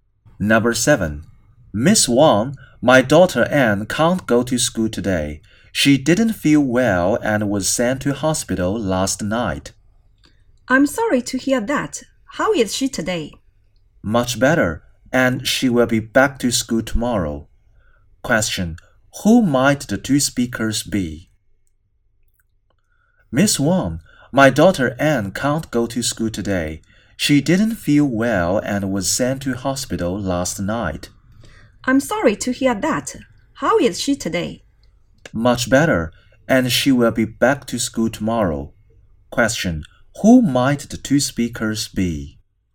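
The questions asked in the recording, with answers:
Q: Question, who might the two speakers be?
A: A parent and a teacher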